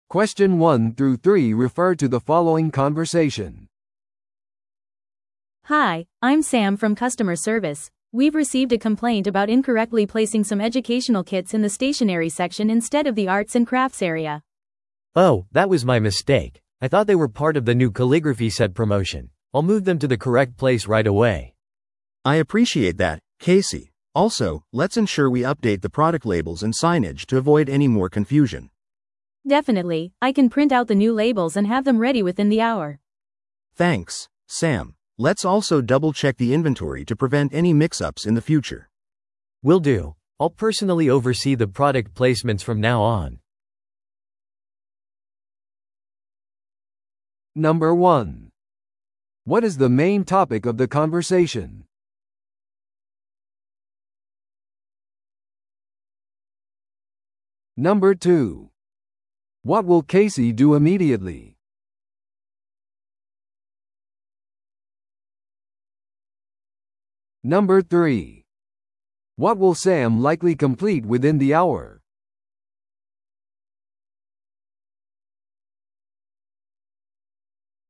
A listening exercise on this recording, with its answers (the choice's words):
Listen to the audio below and answer the questions.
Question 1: What is the main topic of the conversation?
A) 新しい教育キットの紹介。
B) 商品配置に関する苦情への対応。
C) 書道セットの宣伝告知。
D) アート&クラフトセクションの再編成。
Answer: 商品配置に関する苦情への対応。

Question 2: What will Casey do immediately?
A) 文房具セクションのエラーを確認する。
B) 教育キットを正しい場所に移動させる。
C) 商品用の新しいラベルを印刷する。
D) 残りの日の在庫を監督する。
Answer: 教育キットを正しい場所に移動させる。

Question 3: What will Sam likely complete within the hour?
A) 文房具セクションのレイアウトを確認する。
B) 新しい販促のための表示を準備する。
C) 新しい商品ラベルを印刷して準備する。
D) エラーを防ぐために在庫システムを更新する。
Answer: 新しい商品ラベルを印刷して準備する。

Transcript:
A: Hi, I'm Sam from customer service. We've received a complaint about incorrectly placing some educational kits in the stationery section instead of the arts and crafts area.
B: Oh, that was my mistake. I thought they were part of the new calligraphy set promotion. I'll move them to the correct place right away.
C: I appreciate that, Casey. Also, let's ensure we update the product labels and signage to avoid any more confusion.
A: Definitely, I can print out the new labels and have them ready within the hour.
C: Thanks, Sam. Let's also double-check the inventory to prevent any mix-ups in the future.
B: Will do. I'll personally oversee the product placements from now on.